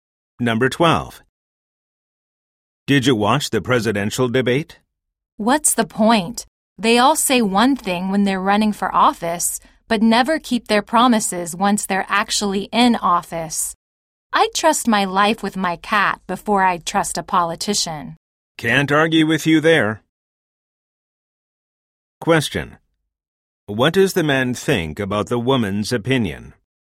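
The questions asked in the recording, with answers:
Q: What does the man think about the woman's opinion?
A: He agrees with her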